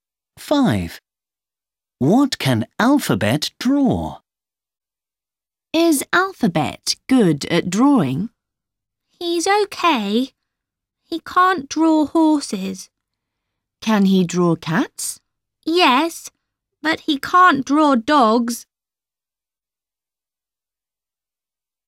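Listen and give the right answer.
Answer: Cats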